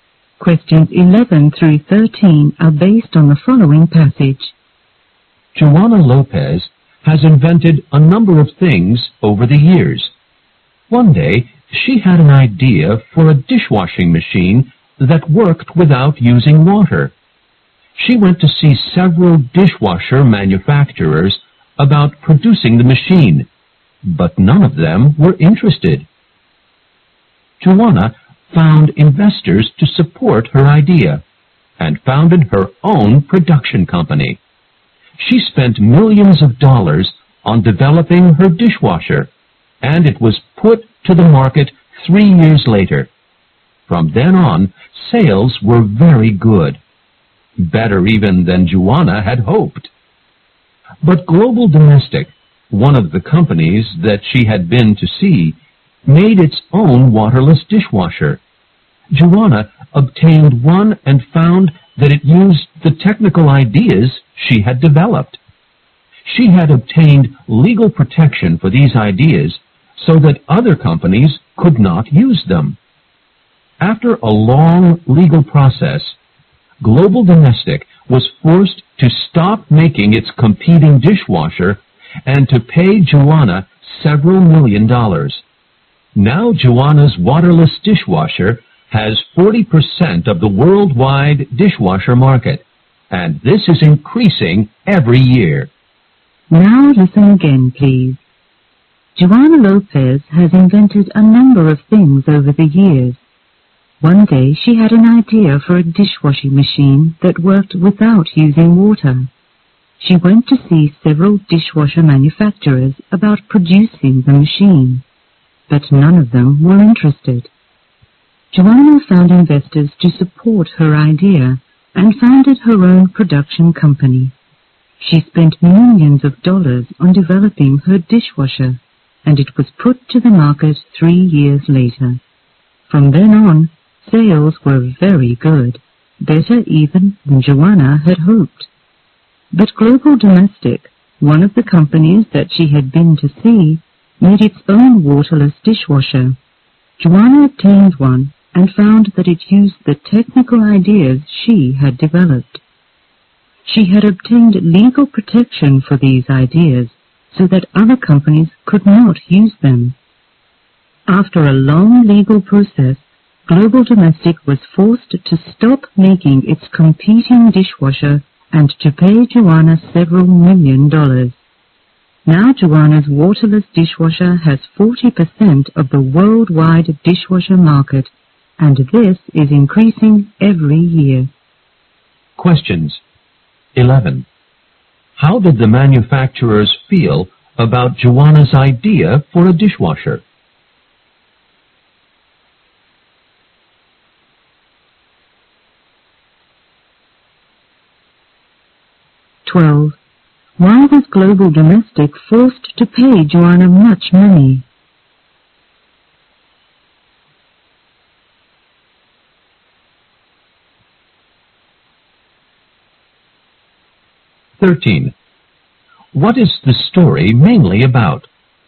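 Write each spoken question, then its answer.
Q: How did the manufacturers feel about Joana's idea for a dishwasher?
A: They were not interested

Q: Why was Global Domestic forced to pay Joana much money?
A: It used the technical ideas she had legally protected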